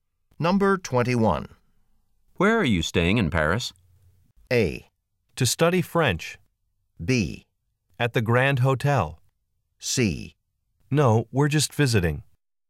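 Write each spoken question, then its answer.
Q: Where are you staying in Paris?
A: B: At the Grand Hotel.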